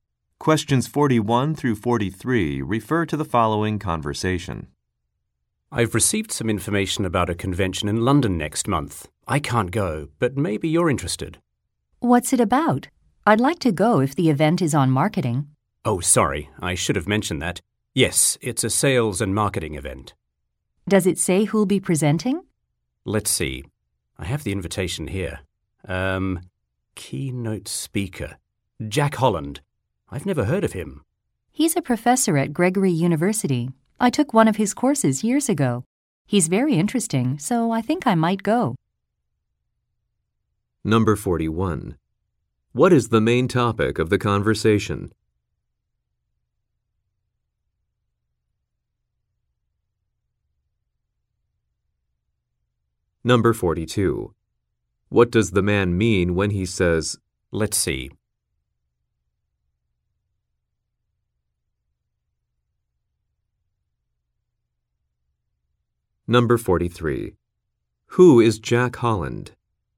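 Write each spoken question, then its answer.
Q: What is the main topic of the conversation?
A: A sales and marketing convention in London

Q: What does the man mean when he says,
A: He will check the invitation

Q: Who is Jack Holland?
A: A professor at Gregory University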